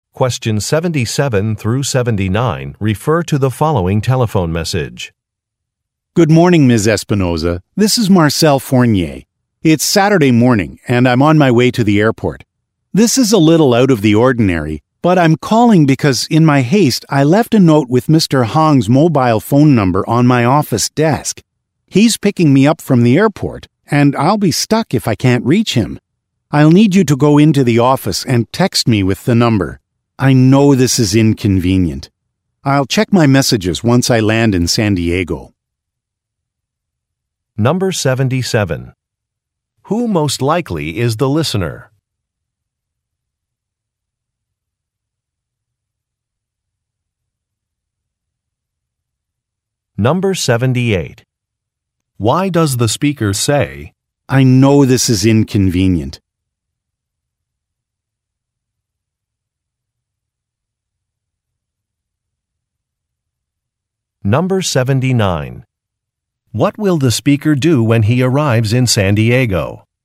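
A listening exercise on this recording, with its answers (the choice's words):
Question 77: Who most likely is the listener?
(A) A travel agent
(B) An administrative assistant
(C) A flight attendant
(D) A security guard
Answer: An administrative assistant

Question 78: Why does the speaker say, "I know this is inconvenient"?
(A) To suggest a deadline extension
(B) To report on an additional cost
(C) To offer an alternative solution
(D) To apologize for a request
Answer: To apologize for a request

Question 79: What will the speaker do when he arrives in San Diego?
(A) Retrieve his messages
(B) Check in to a hotel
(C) Change a flight reservation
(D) Visit a company office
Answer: Retrieve his messages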